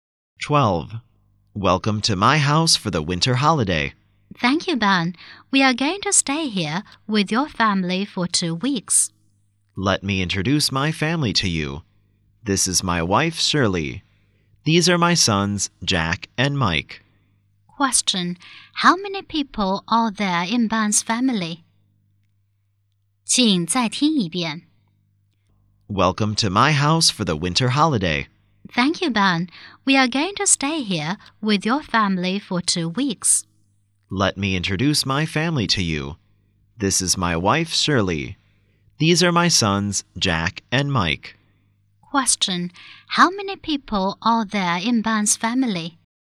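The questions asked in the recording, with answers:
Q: How many people are there in Ben's family?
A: Four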